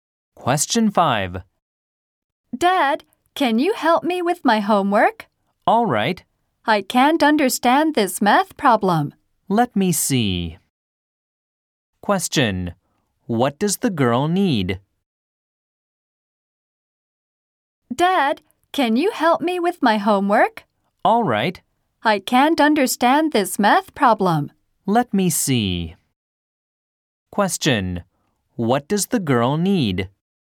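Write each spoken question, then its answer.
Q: What does the girl need?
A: Help with her math homework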